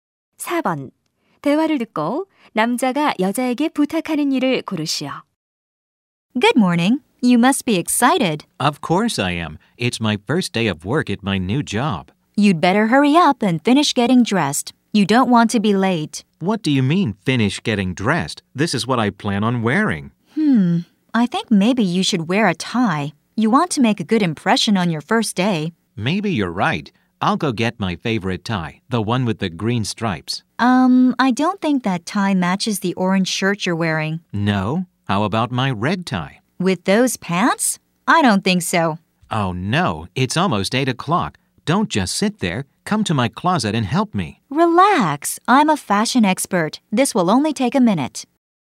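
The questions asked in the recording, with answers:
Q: 대화를 듣고 남자가 여자에게 부탁하는 일을 고르시오.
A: 옷장에 와서 옷(넥타이) 고르는 것을 도와 달라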